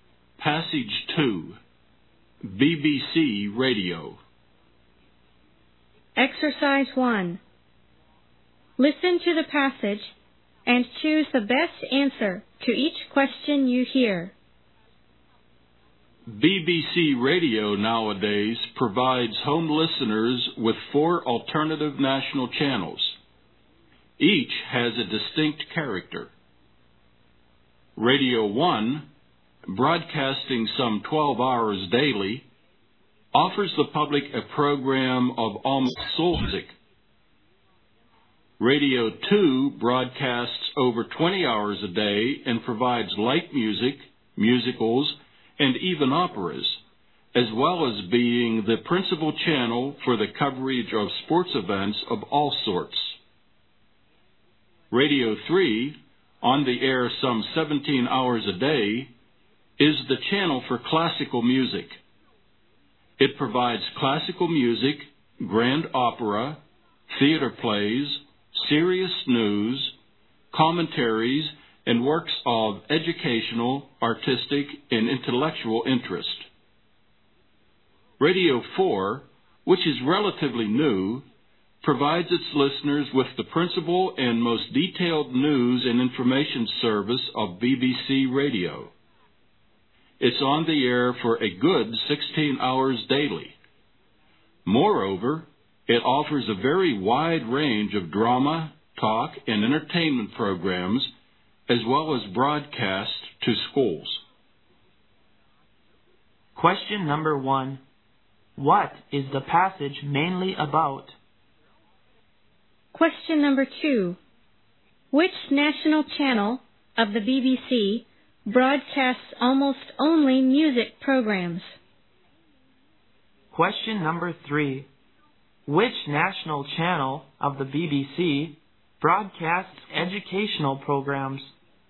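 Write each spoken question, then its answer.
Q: What is the passage mainly about?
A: BBC Radio's four national channels

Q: Which national channel of the BBC broadcasts almost only music programs?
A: Radio 1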